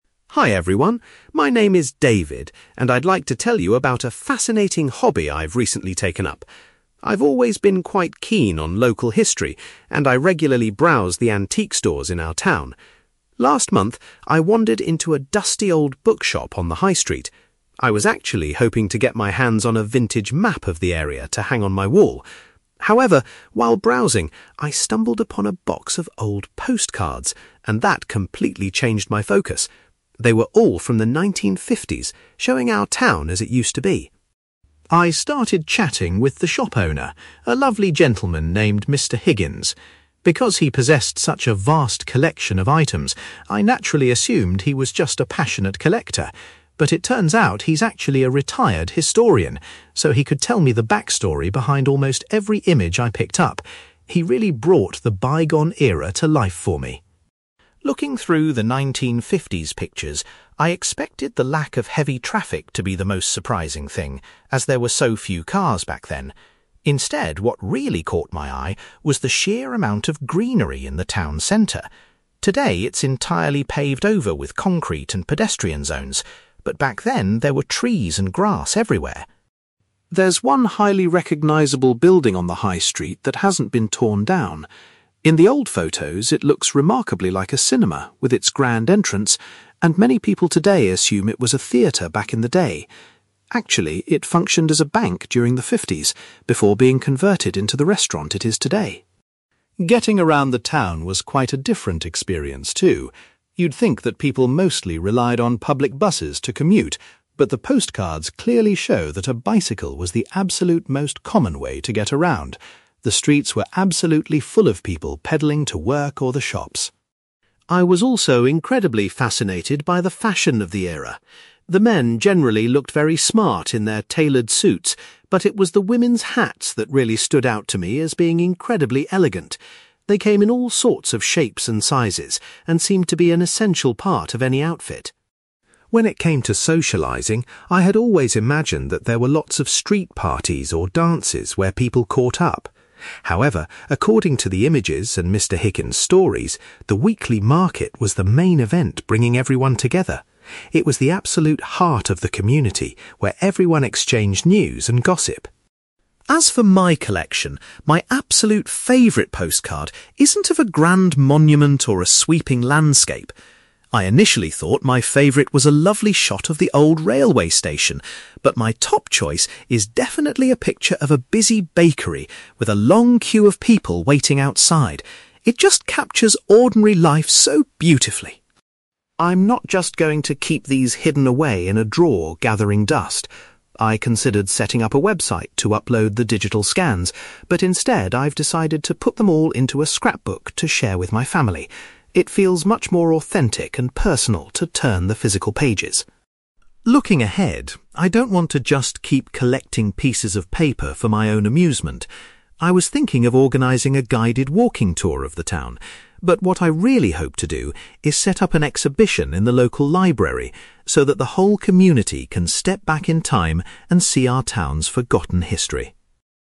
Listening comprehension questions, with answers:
You will hear a young man called David giving a presentation about his hobby of collecting vintage items. For questions 9-18, complete the sentences with a word or short phrase.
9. David originally went to the shop to buy a map, but purchased some (9)........................... instead.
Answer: postcards

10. David was surprised to discover that the shop owner used to work as a (10)........................... .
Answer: historian

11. David says that the abundance of (11)........................... in the 1950s town centre was the most striking difference.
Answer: greenery

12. A prominent building on the high street actually served as a (12)........................... in the 1950s.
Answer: bank

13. According to the images, the main form of transport for locals was the (13)........................... .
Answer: bicycle

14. David was particularly impressed by the stylish (14)........................... worn by the women in the pictures.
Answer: hats

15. The pictures reveal that a (15)........................... was the central social gathering for the townspeople.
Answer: market

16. Out of all the images, David's preferred one features a (16)........................... .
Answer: bakery

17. David has decided to create a (17)........................... to display his collection to his relatives.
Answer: scrapbook

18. David's ultimate ambition is to organise an (18)........................... at the town library.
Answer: exhibition

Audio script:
David: Hi everyone, my name is David, and I'd like to tell you about a fascinating hobby I've recently taken up. I've always been quite keen on local history, and I regularly browse the antique stores in our town. Last month, I wandered into a dusty old bookshop on the high street. I was actually hoping to get my hands on a vintage map of the area to hang on my wall. However, while browsing, I stumbled upon a box of old postcards, and that completely changed my focus. They were all from the 1950s, showing our town as it used to be.
I started chatting with the shop owner, a lovely gentleman named Mr. Higgins. Because he possessed such a vast collection of items, I naturally assumed he was just a passionate collector. But it turns out he's actually a retired historian, so he could tell me the backstory behind almost every image I picked up. He really brought the bygone era to life for me.
Looking through the 1950s pictures, I expected the lack of heavy traffic to be the most surprising thing, as there were so few cars back then. Instead, what really caught my eye was the sheer amount of greenery in the town centre. Today, it's entirely paved over with concrete and pedestrian zones, but back then, there were trees and grass everywhere.
There's one highly recognisable building on the high street that hasn't been torn down. In the old photos, it looks remarkably like a cinema with its grand entrance, and many people today assume it was a theatre back in the day. Actually, it functioned as a bank during the fifties, before being converted into the restaurant it is today.
Getting around the town was quite a different experience, too. You'd think that people mostly relied on public buses to commute, but the postcards clearly show that a bicycle was the absolute most common way to get around. The streets were absolutely full of people pedalling to work or the shops.
I was also incredibly fascinated by the fashion of the era. The men generally looked very smart in their tailored suits, but it was the women's hats that really stood out to me as being incredibly elegant. They came in all sorts of shapes and sizes and seemed to be an essential part of any outfit.
When it came to socialising, I had always imagined that there were lots of street parties or dances where people caught up. However, according to the images and Mr. Higgins' stories, the weekly market was the main event bringing everyone together. It was the absolute heart of the community where everyone exchanged news and gossip.
As for my collection, my absolute favourite postcard isn't of a grand monument or a sweeping landscape. I initially thought my favourite was a lovely shot of the old railway station, but my top choice is definitely a picture of a busy bakery, with a long queue of people waiting outside. It just captures ordinary life so beautifully.
I'm not just going to keep these hidden away in a drawer gathering dust. I considered setting up a website to upload the digital scans, but instead I've decided to put them all into a scrapbook to share with my family. It feels much more authentic and personal to turn the physical pages.
Looking ahead, I don't want to just keep collecting pieces of paper for my own amusement. I was thinking of organising a guided walking tour of the town, but what I really hope to do is set up an exhibition in the local library so that the whole community can step back in time and see our town's forgotten history.

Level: B2